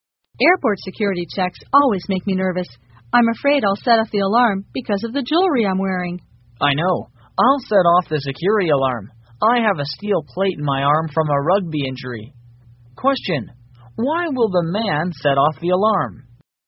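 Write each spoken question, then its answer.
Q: Why will the man set off the alarm?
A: He has a steel plate in his arm from a rugby injury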